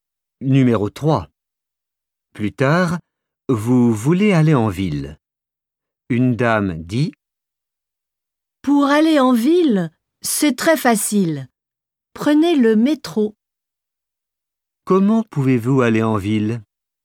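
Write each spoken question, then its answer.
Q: Comment pouvez-vous aller en ville ?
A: en métro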